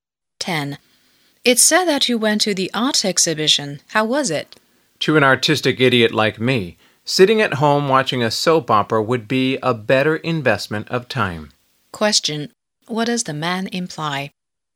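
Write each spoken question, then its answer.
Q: What does the man imply?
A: The exhibition was a waste of time for him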